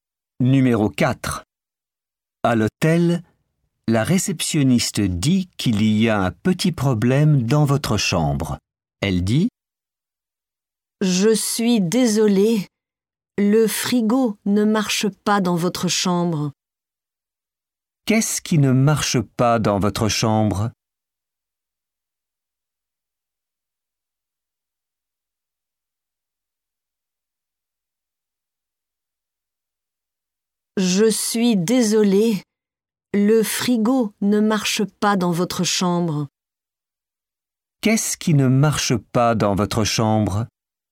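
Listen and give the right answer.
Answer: Le frigo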